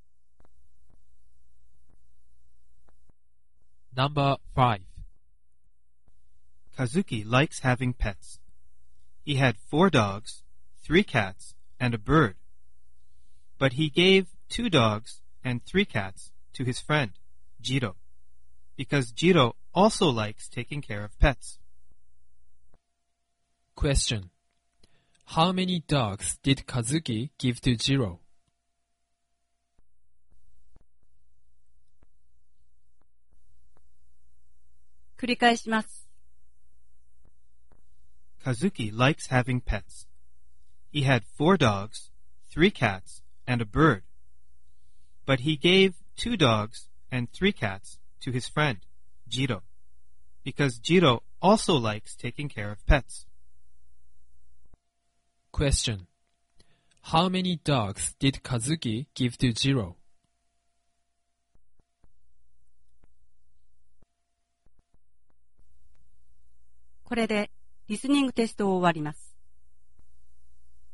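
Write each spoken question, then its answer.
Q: How many dogs did Kazuki give to Jiro?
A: Two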